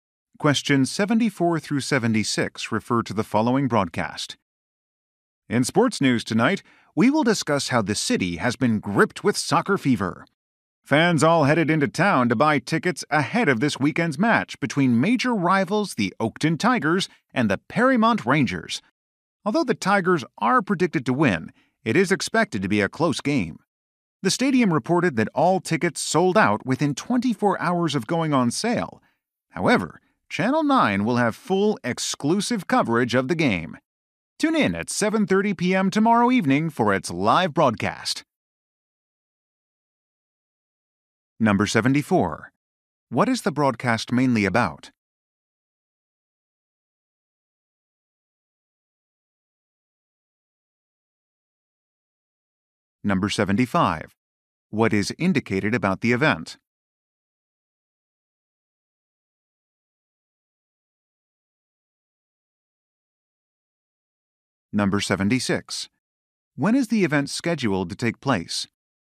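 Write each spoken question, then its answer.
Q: What is the broadcast mainly about?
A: A soccer match

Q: When is the event scheduled to take place?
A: Tomorrow at 7:30 p.m.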